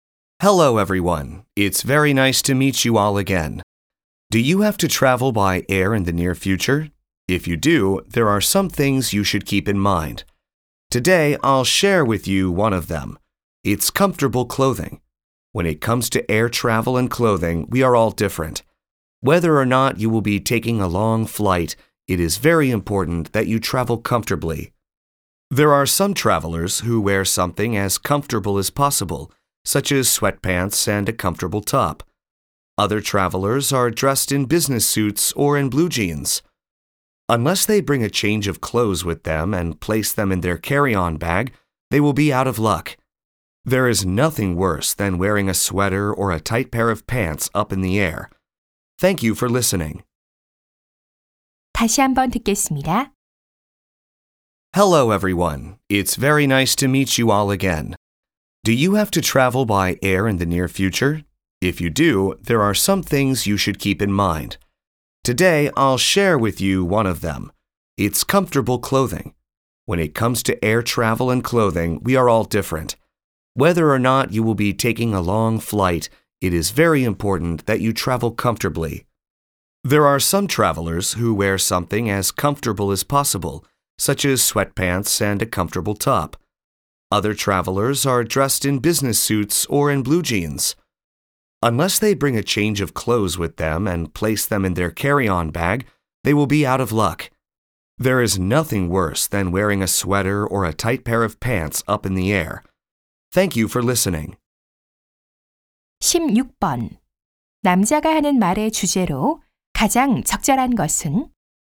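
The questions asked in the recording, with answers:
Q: 남자가 하는 말의 주제로 가장 적절한 것은?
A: 비행기 여행 시 편안한 옷차림의 중요성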